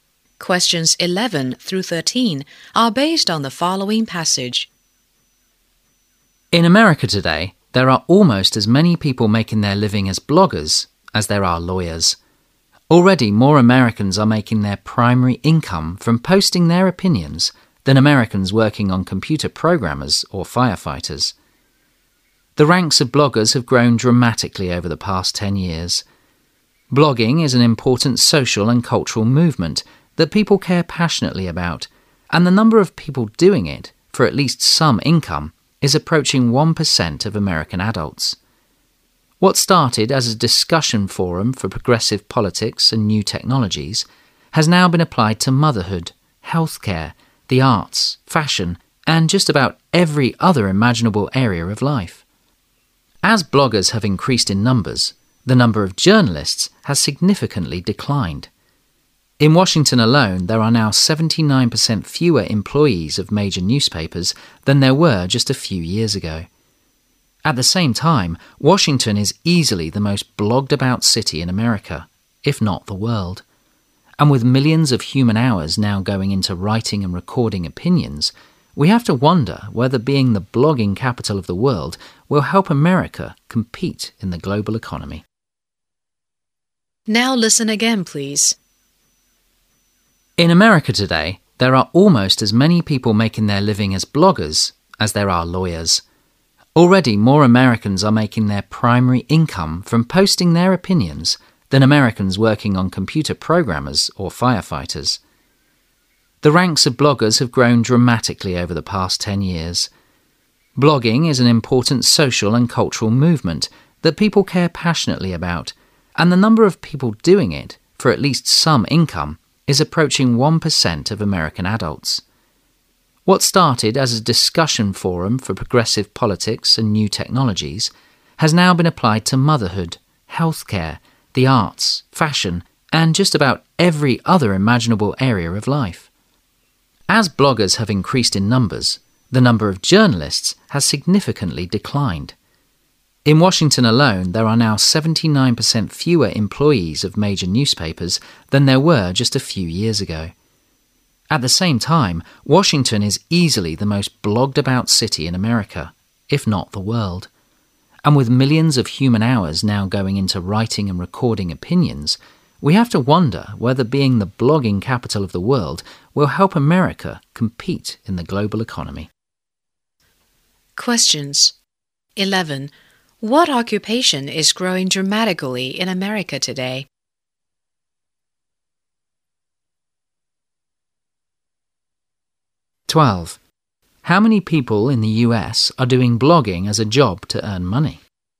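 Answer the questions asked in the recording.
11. Blogging
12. Nearly 1% of American adults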